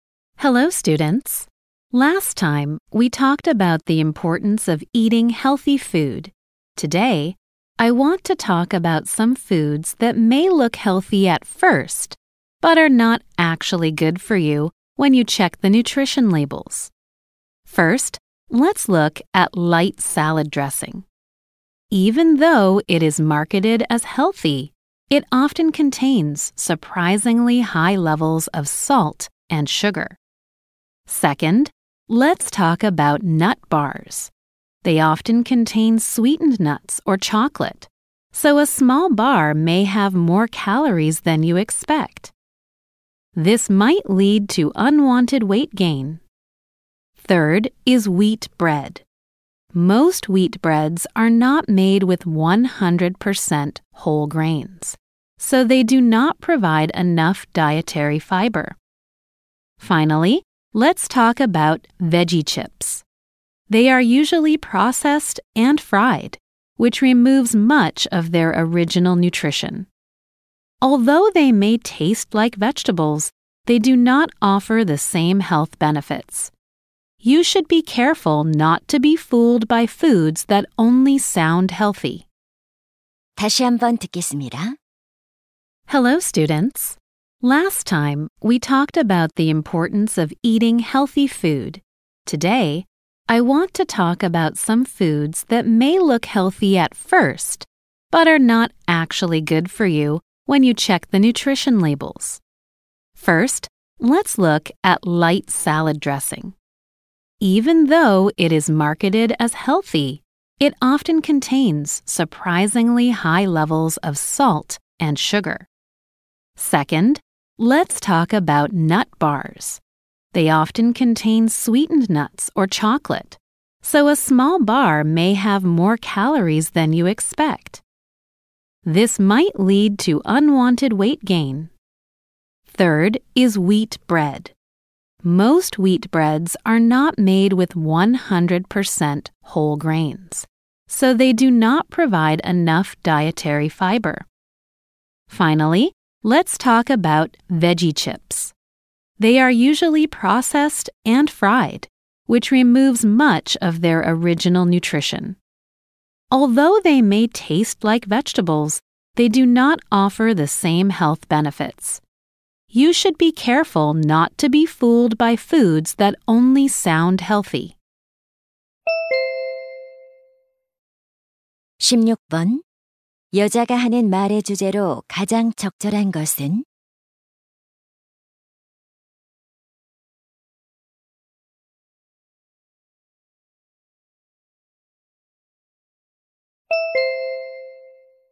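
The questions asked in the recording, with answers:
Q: 여자가 하는 말의 주제로 가장 적절한 것은?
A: 건강해 보이지만 실제로는 건강에 좋지 않은 음식들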